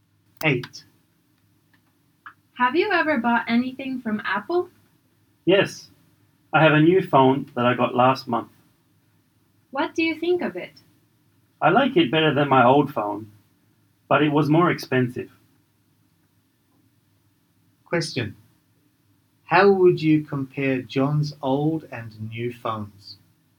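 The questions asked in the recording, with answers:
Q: How would you compare John's old and new phones?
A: The new phone is better but more expensive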